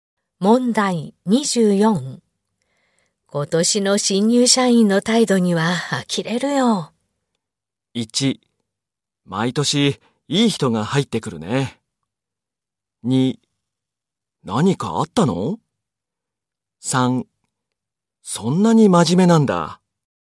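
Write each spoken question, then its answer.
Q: 今年の新入社員の態度には呆れるよ。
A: 2: 何かあったの?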